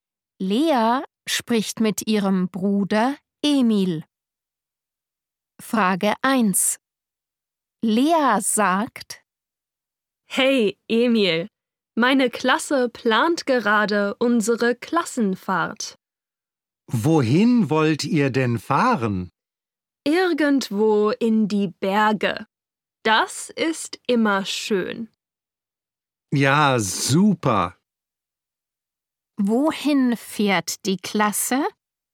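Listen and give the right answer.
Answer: In die Berge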